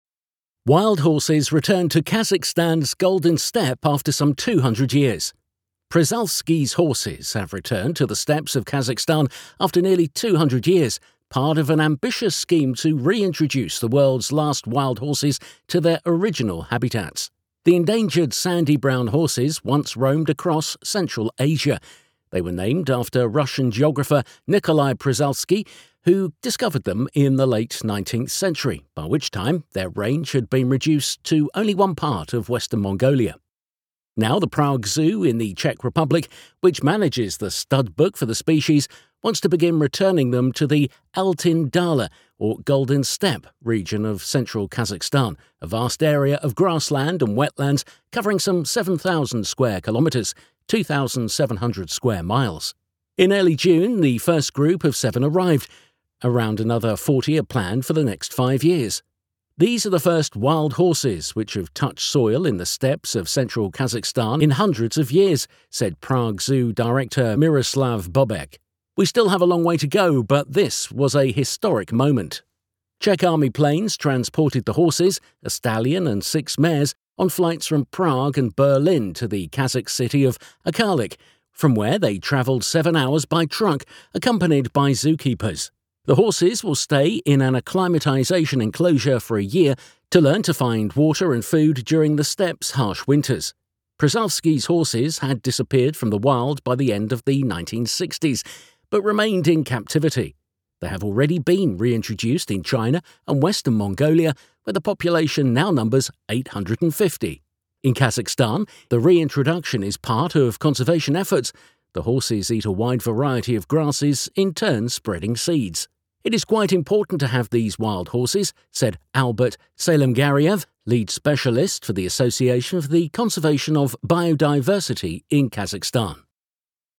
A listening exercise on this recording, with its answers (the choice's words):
Pick the best possible way to fill in the gaps in the sentences.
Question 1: Przewalski's horses ..... the steppes of Kazakhstan after nearly 200 years.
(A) have disappeared from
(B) have come back to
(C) have made their way out of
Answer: have come back to

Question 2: By the late 19th century their range ..... only one part of western Mongolia.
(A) had been escalating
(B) had doubled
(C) had shrunk to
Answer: had shrunk to

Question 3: In early June, the first group of seven arrived. Around another 40 ...... .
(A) are going to get here for the next half decade.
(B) are planned to be transported here for the next decade.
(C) are planning to be adopted in the next fifteen years.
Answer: are going to get here for the next half decade.

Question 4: A stallion and six mares .......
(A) made a seven-hour truck ride, accompanied by zoo workers.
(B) flew directly from Prague to Arkalyk.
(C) were transported by Czech army planes for seven hours.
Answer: made a seven-hour truck ride, accompanied by zoo workers.

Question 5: By the end of the 1960s, Przewalski's horses .......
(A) had vanished from the wild, but remained in captivity.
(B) had appeared in the wild, but were kept in captivity.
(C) had become extinct.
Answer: had vanished from the wild, but remained in captivity.

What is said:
Wild horses return to Kazakhstan's Golden Steppe after some 200 years
Przewalski's horses have returned to the steppes of Kazakhstan after nearly 200 years, part of an ambitious scheme to reintroduce the world's last wild horses to their original habitats.
The endangered sandy brown horses once roamed across Central Asia. They were named after Russian geographer Nikolai Przewalski who discovered them in the late 19th century, by which time their range had been reduced to only one part of western Mongolia.
Now, the Prague Zoo in the Czech Republic, which manages the studbook for the species, wants to begin returning them to the Altyn Dala, or Golden Steppe, region of central Kazakhstan, a vast area of grassland and wetlands covering some 7,000 square kilometres (2,700 square miles).
In early June, the first group of seven arrived. Around another 40 are planned for the next five years.
"These are the first wild horses which have touched soil in the steppes of central Kazakhstan in hundreds of years," said Prague Zoo director Miroslav Bobek.
"We still have a long way to go, but this was a historic moment."
Czech army planes transported the horses – a stallion and six mares – on flights from Prague and Berlin to the Kazakh city of Arkalyk, from where they travelled seven hours by truck, accompanied by zoo keepers.
The horses will stay in an acclimatisation enclosure for a year to learn to find water and food during the steppe's harsh winters.
Przewalski's horses had disappeared from the wild by the end of the 1960s, but remained in captivity. They have already been reintroduced in China and western Mongolia, where the population now numbers 850.
In Kazakhstan, the reintroduction is part of conservation efforts – the horses eat a wide variety of grasses, in turn spreading seeds.
"It is quite important to have these wild horses," said Albert Salemgareyev, lead specialist for the Association for the Conversation of Biodiversity in Kazakhstan.